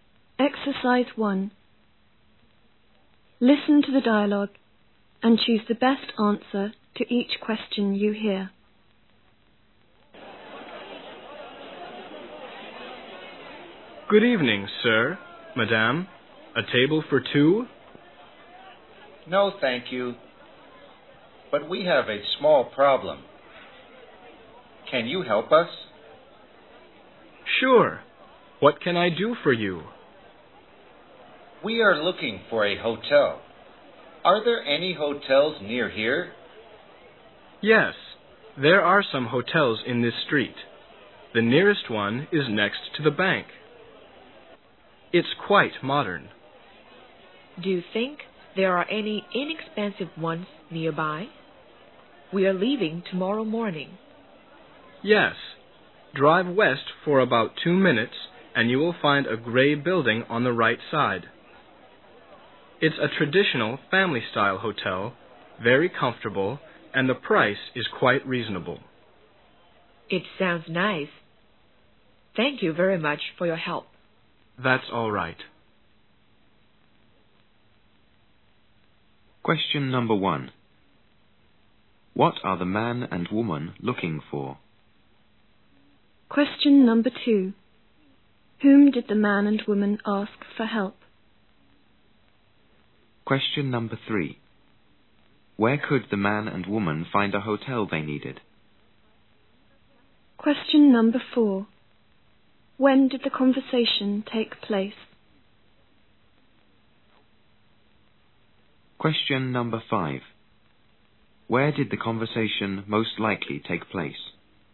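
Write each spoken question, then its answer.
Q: What are the man and woman looking for?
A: A hotel

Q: Where could the man and woman find a hotel they needed?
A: In a gray building on the right, about 2 minutes' drive west

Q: When did the conversation take place?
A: In the evening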